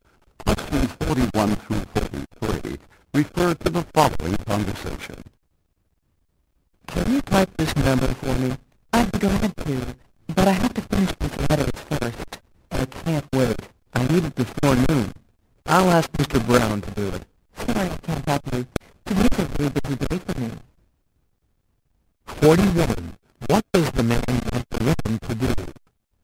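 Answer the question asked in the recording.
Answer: Type a number (document) for him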